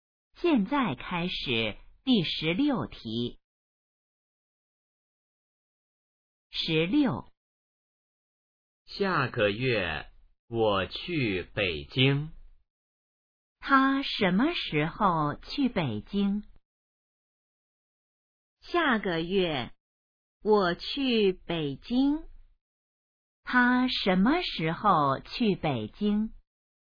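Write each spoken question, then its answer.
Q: 他什么时候去北京?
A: 下个月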